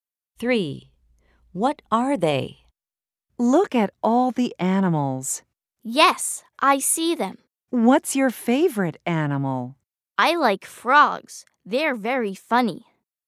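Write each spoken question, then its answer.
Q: What are they?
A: Frogs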